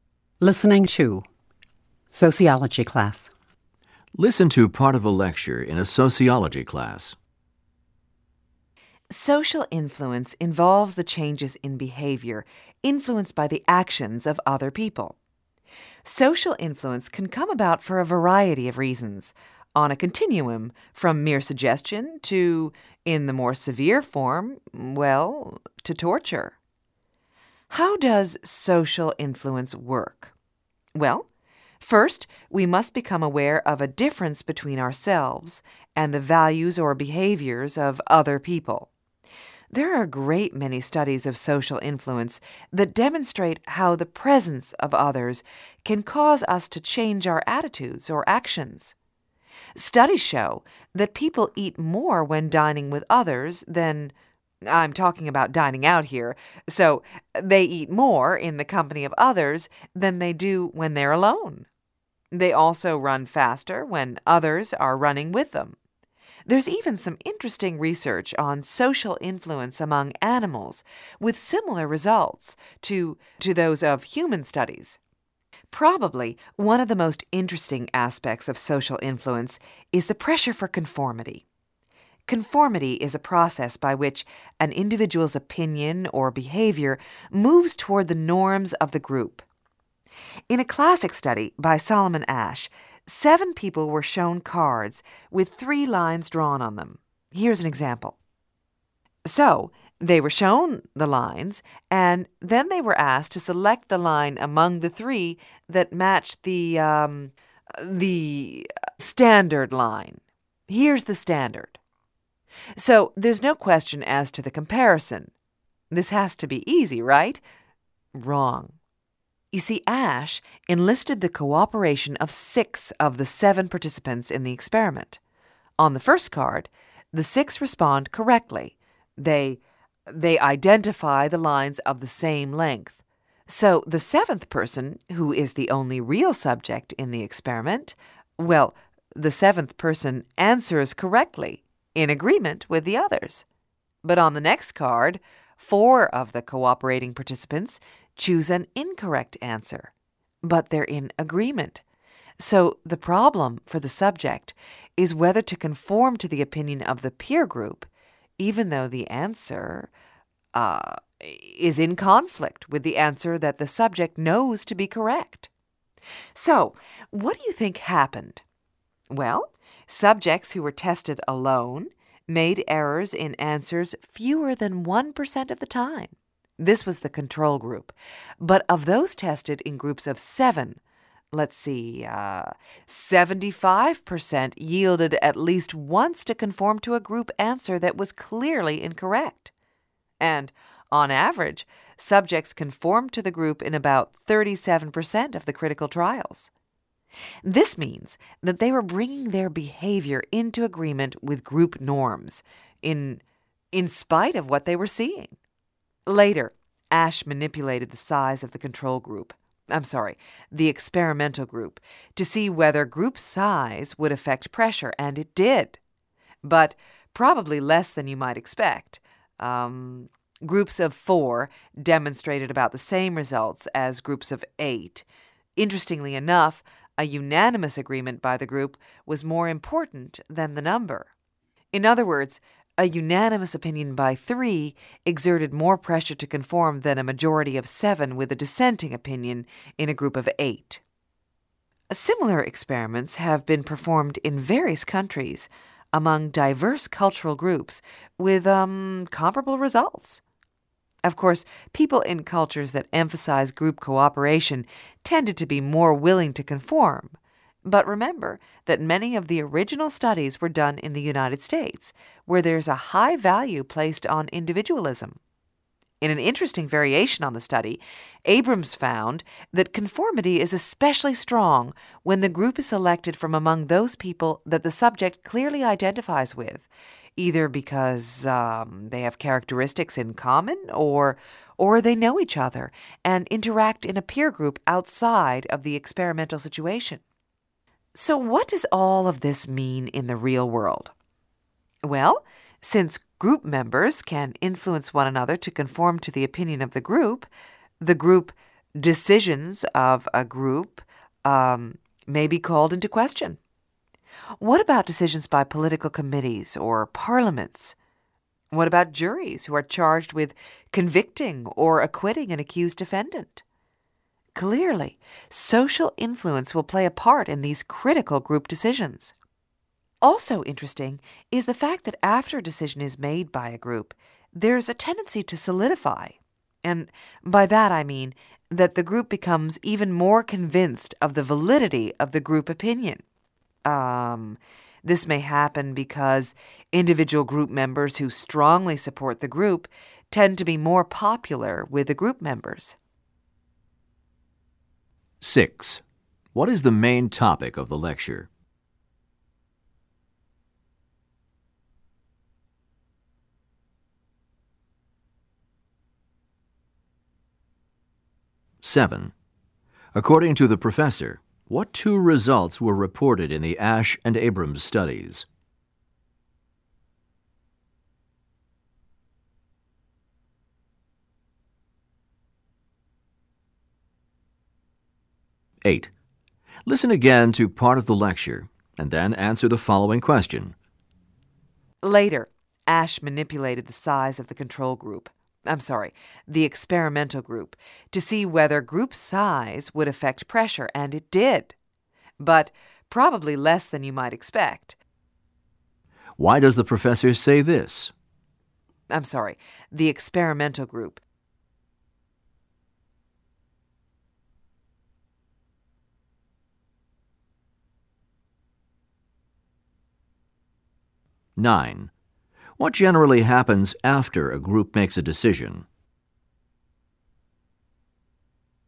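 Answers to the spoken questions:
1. Social influence and conformity
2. The group becomes even more convinced its opinion is right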